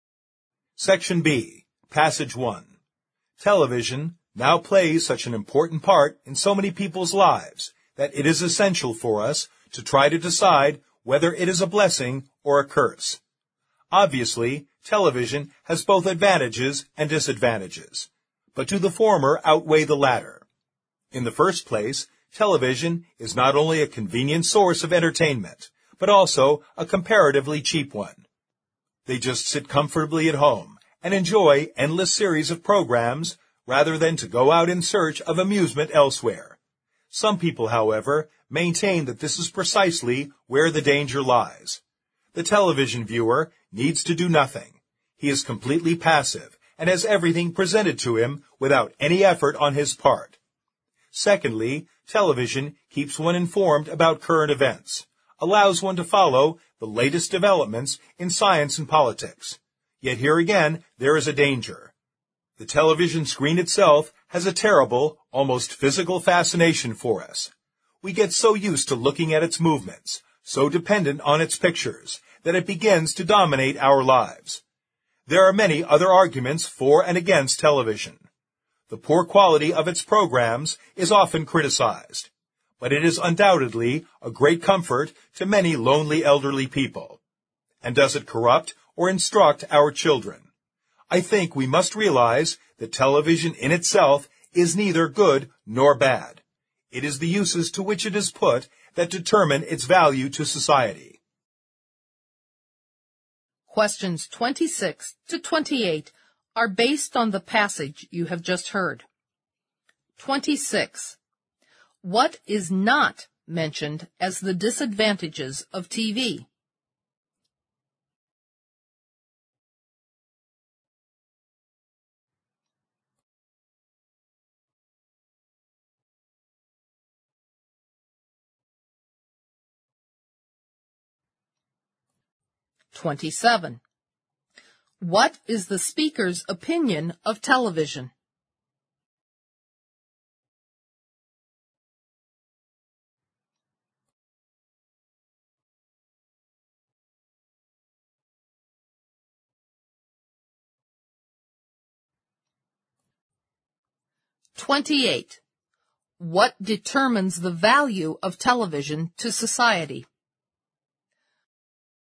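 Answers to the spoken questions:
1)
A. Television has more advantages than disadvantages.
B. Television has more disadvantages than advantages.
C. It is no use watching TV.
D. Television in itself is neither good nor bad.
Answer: D. Television in itself is neither good nor bad.
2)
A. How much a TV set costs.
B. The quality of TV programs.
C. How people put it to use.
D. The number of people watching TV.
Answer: C. How people put it to use.
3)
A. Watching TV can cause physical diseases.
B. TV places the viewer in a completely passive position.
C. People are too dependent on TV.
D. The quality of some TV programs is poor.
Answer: A. Watching TV can cause physical diseases.

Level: 四级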